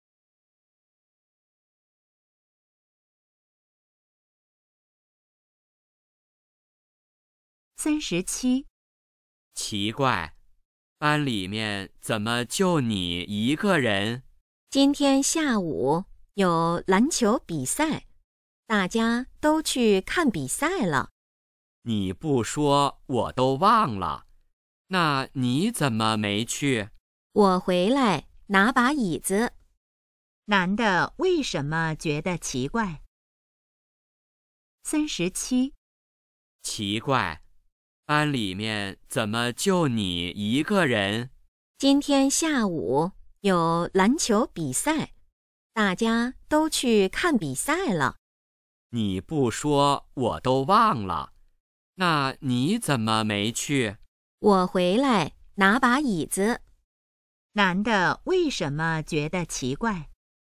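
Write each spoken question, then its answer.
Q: 男的为什么觉得奇怪?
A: 班里只有一个人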